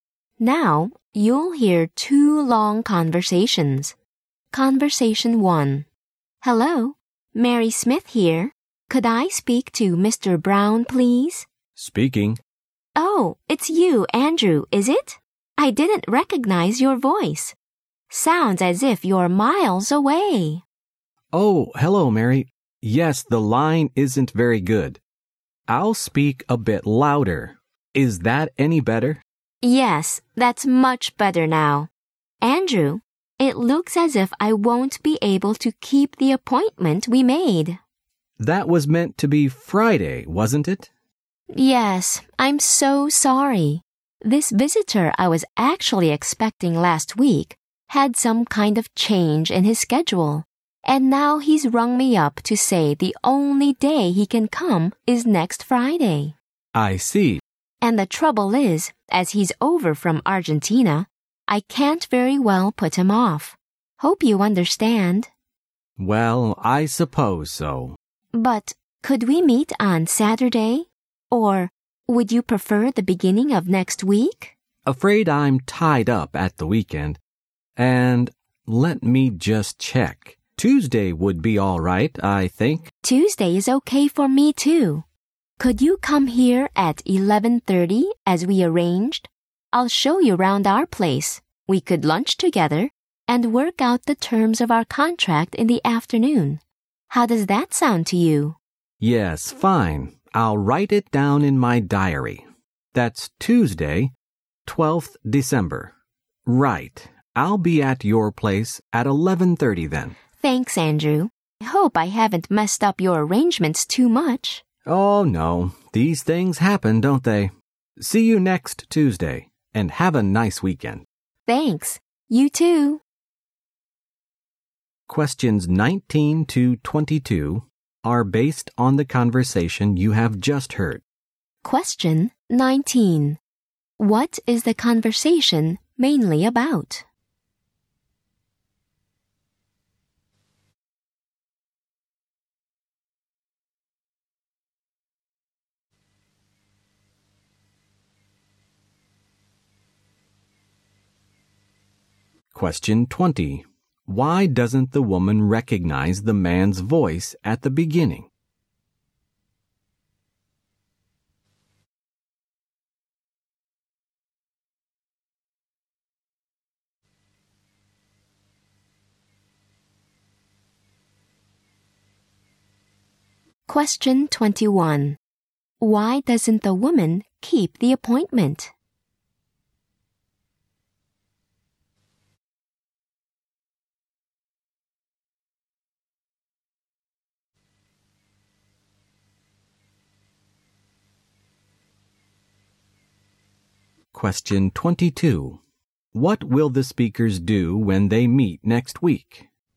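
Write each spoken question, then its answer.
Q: What is the conversation mainly about?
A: Changing an appointment

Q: Why doesn't the woman recognize the man's voice at the beginning?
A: The phone line is bad

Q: Why doesn't the woman keep the appointment?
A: A visitor from Argentina can only come that Friday

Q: What will the speakers do when they meet next week?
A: Tour her place, have lunch and work out the contract terms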